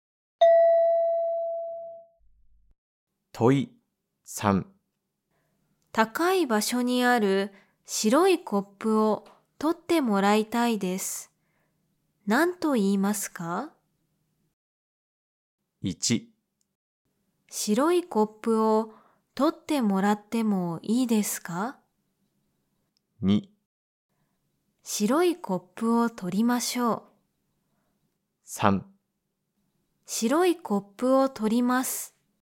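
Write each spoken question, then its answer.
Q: 高い場所にある白いコップを取ってもらいたいです。何と言いますか?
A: 1: 白いコップを取ってもらってもいいですか?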